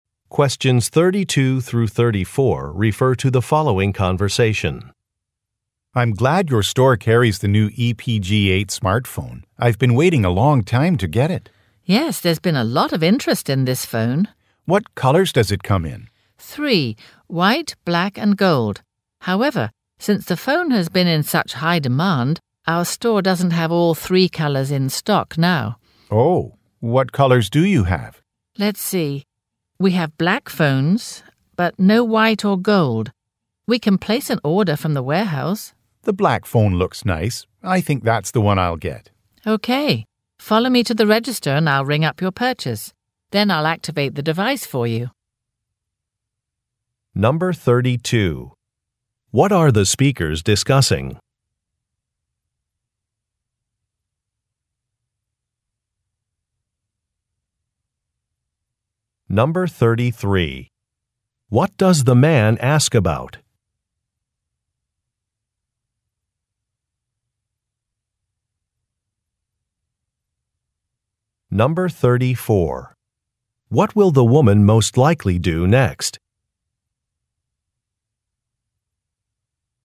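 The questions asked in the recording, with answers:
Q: What are the speakers discussing?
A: A new smartphone (the EPG8)

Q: What does the man ask about?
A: The colors the phone comes in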